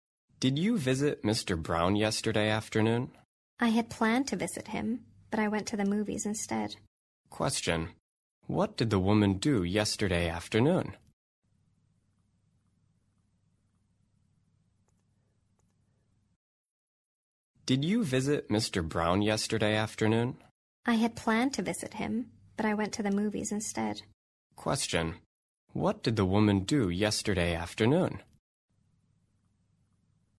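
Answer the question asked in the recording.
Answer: She went to the movies.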